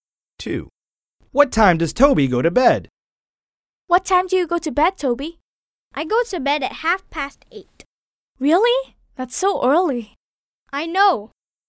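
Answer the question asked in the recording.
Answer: at 8:30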